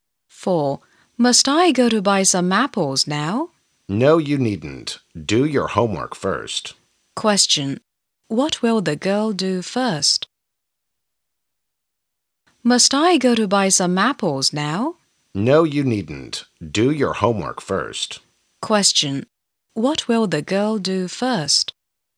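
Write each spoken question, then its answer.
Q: What will the girl do first?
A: Do her homework.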